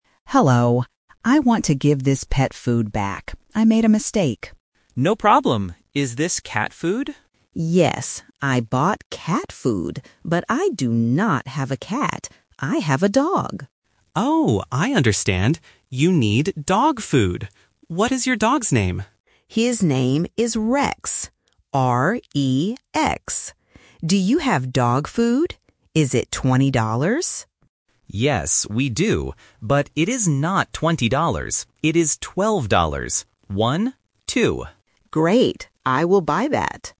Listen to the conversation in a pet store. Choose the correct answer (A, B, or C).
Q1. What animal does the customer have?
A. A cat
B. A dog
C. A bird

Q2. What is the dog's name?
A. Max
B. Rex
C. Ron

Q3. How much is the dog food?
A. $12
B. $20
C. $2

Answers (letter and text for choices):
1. B. A dog
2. B. Rex
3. A. $12

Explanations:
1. The customer says, "But I do not have a cat. I have a dog." Option A (A cat) is the trap because the customer bought cat food by mistake. Option C (A bird) is not mentioned in the audio.
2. The customer spells the dog's name: "R-E-X." Option A (Max) is a trap because it sounds a little similar and is a common dog name. Option C (Ron) is not mentioned.
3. The employee says, "It is twelve dollars. One, two." Option B ($20) is the trap because the customer asks, "Is it twenty dollars?" but the employee says no. Option C ($2) is a distractor from the "two" in "One, two".

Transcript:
Customer: Hello. I want to give this pet food back. I made a mistake.
Employee: No problem. Is this cat food?
Customer: Yes. I bought cat food. But I do not have a cat. I have a dog.
Employee: Oh, I understand. You need dog food. What is your dog's name?
Customer: His name is Rex. R-E-X. Do you have dog food? Is it twenty dollars?
Employee: Yes, we do. But it is not twenty dollars.

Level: A1